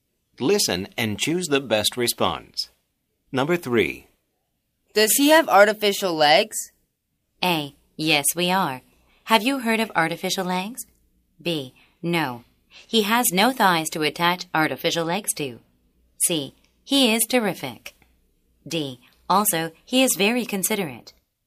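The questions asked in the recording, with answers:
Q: Does he have artificial legs?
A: B: No. He has no thighs to attach artificial legs to.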